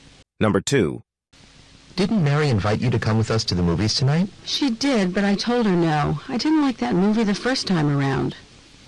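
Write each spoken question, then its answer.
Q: What can be inferred about the woman?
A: She has already seen the movie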